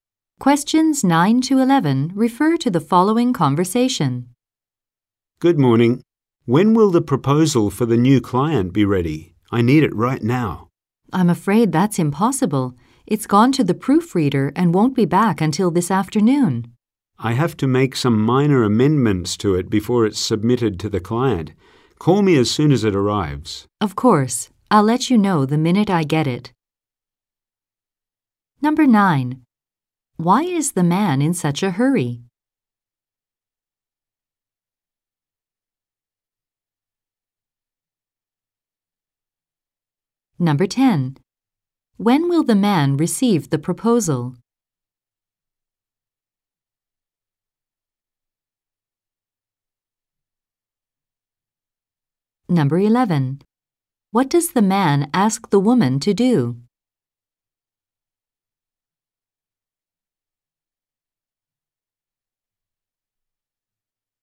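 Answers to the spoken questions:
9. He must make minor amendments to the proposal before it goes to the client
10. This afternoon
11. Call him as soon as the proposal arrives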